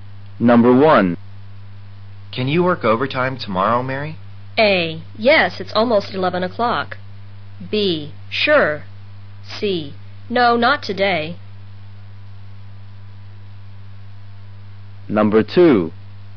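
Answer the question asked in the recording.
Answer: B: Sure.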